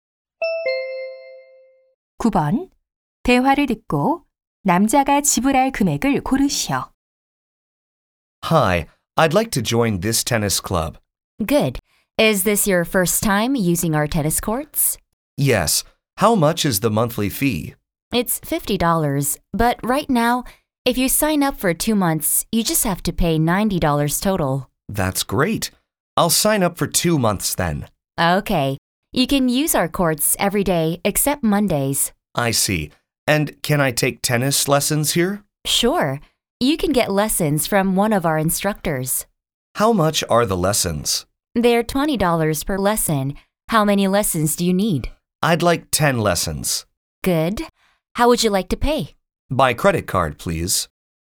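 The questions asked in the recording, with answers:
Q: 대화를 듣고 남자가 지불할 금액을 고르시오.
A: $290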